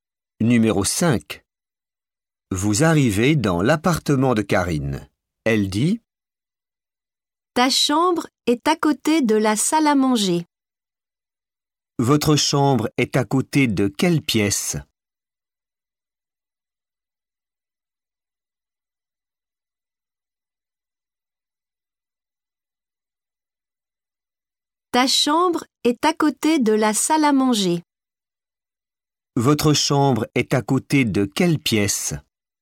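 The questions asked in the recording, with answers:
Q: Votre chambre est à côté de quelle pièce ?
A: La salle à manger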